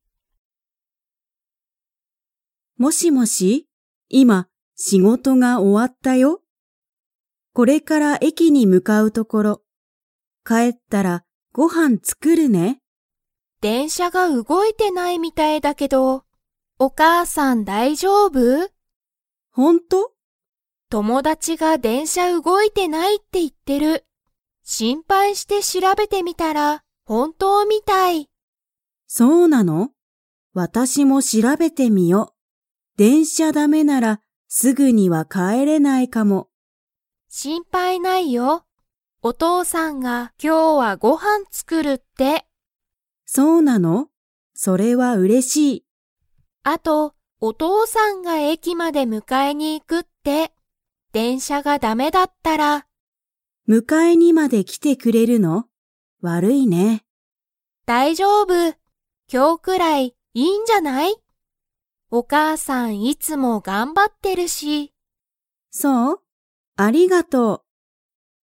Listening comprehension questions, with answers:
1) お母かあさんは、仕事しごとが 。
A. 終おわった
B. 終おわっていない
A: A. 終おわった

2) 電車でんしゃがだめなら、誰だれがお母かあさんを迎むかえに行いきますか?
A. アミ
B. お母かあさん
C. お父とうさん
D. アミの友達ともだち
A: C. お父とうさん

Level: Level 3

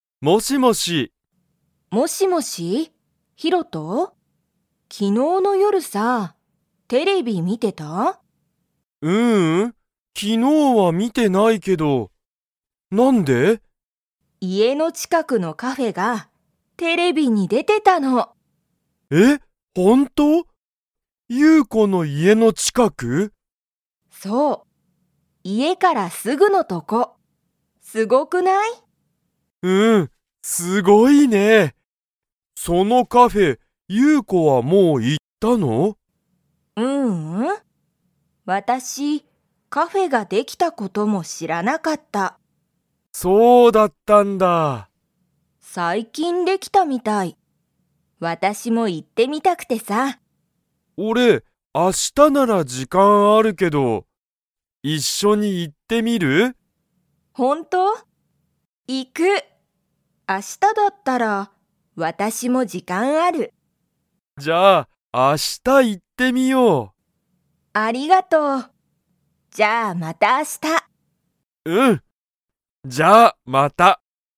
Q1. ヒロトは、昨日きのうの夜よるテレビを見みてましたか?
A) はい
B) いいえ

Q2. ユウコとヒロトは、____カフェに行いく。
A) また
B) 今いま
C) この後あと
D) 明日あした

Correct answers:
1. B) いいえ
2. D) 明日あした

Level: Level 2

